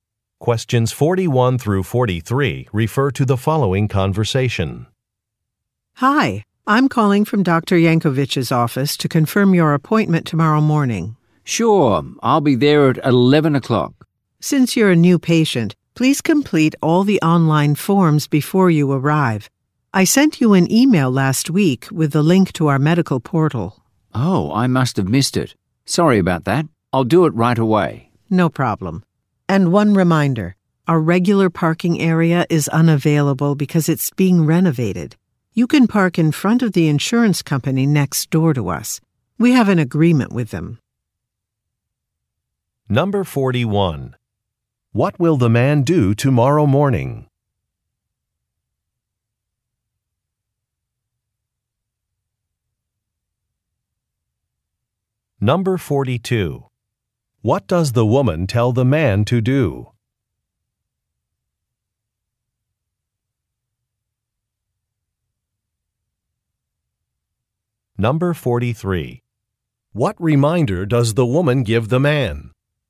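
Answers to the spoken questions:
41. Go to a doctor's appointment
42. Complete the online forms
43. Park in front of the insurance company next door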